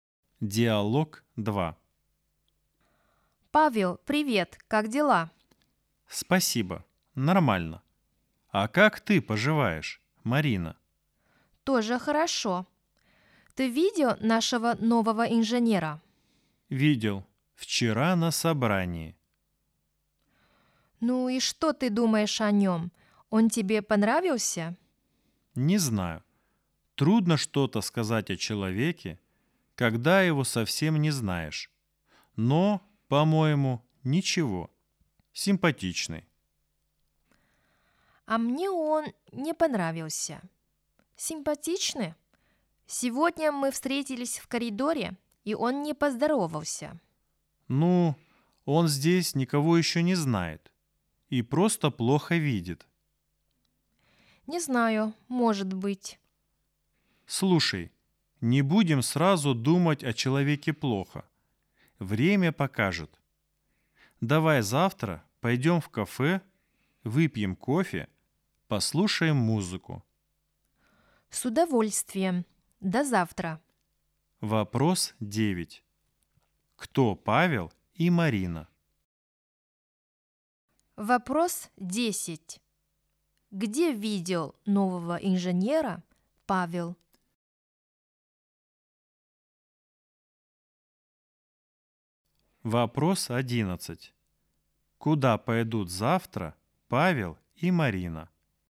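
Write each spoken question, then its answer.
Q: Где видел нового инженера Павел?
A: вчера на собрании

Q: Куда пойдут завтра Павел и Марина?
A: в кафе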